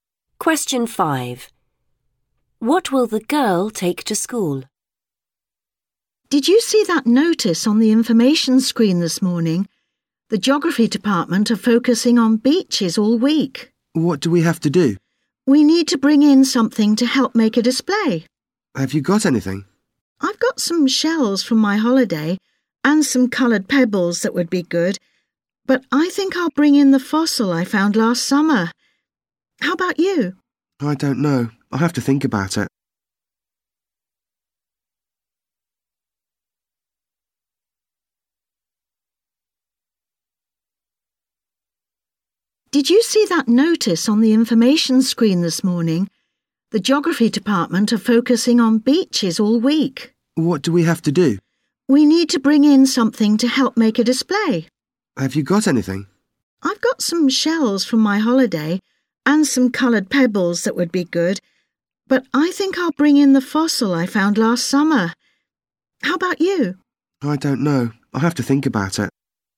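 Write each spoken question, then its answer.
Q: What will the girl take to school?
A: A fossil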